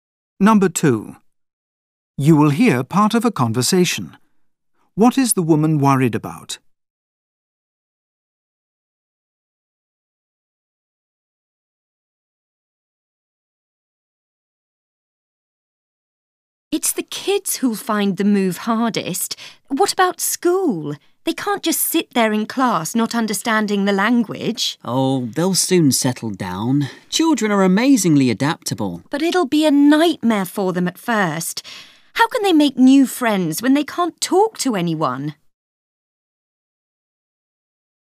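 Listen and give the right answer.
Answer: The children won't be able to communicate or make friends at first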